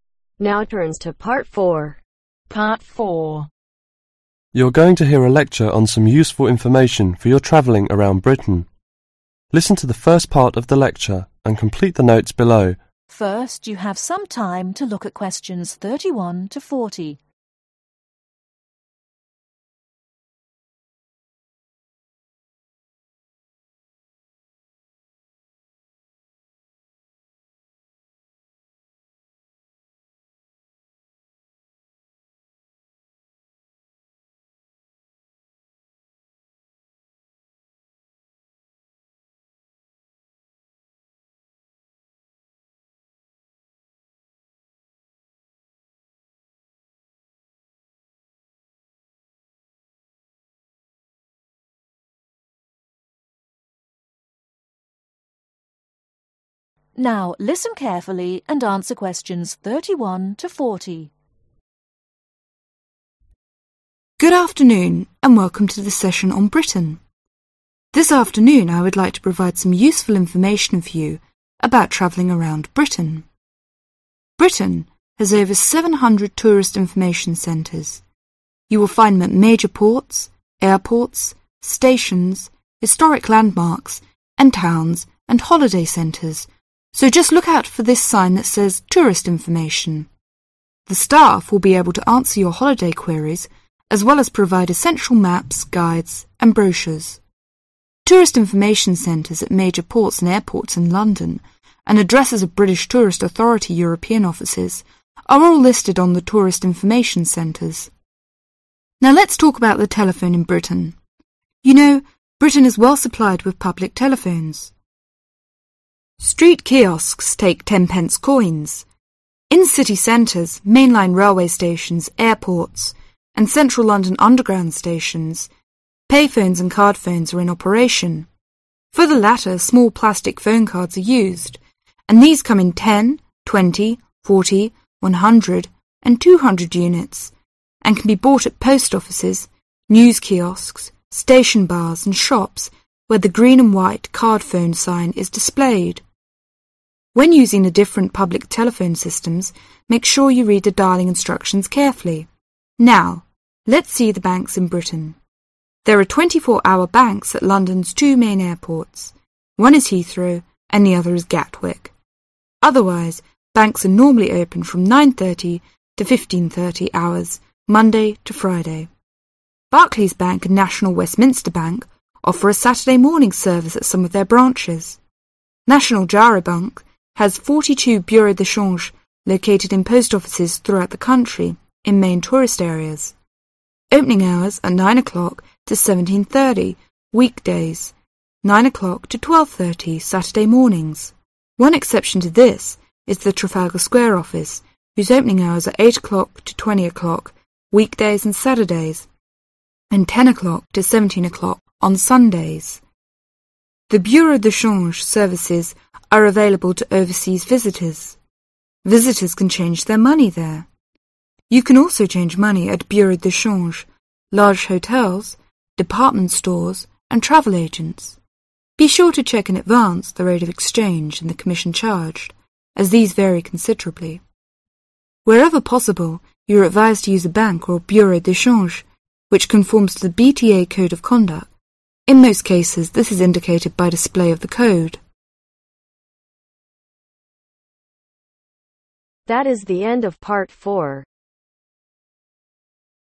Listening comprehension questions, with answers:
Complete the notes below. Write ONE WORD ONLY for each answer.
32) (32)............ landmarks and towns and holiday centres.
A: Historic

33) One is (33)............ and the other is card – phones.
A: Payphones

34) you can buy at post (34)............, news Kiosks, station bars and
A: Offices

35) (35)............ .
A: Shops

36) Banks are normally open from 9:30 to 15:30 Monday to (36)............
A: Friday

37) but at London's two main (37)............ there are 24 – hours banks.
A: Airports

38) Trafalgar Square Office opens from 8:00 to 20:00 weekdays and (38)............ .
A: Saturdays

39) The Bureau de Charge services are available to overseas (39)............ .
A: Visitors

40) You can also change money at Bureau de change, large hotels, (40)............ stores and travel agents.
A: Department